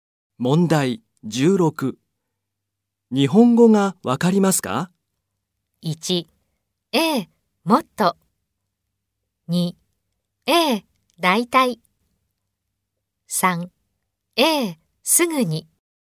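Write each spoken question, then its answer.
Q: 日本語がわかりますか?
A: 2: ええ、だいたい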